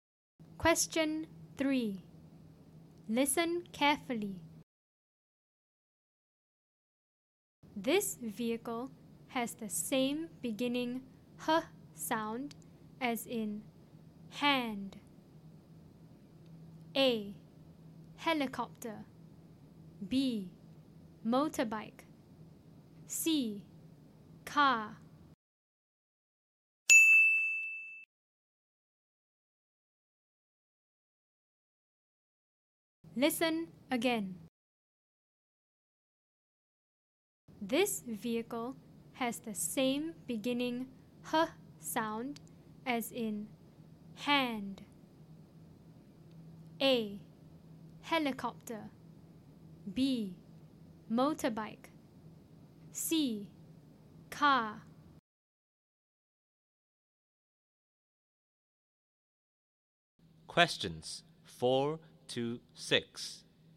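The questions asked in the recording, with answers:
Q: This vehicle has the same beginning h sound as in hand.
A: A: helicopter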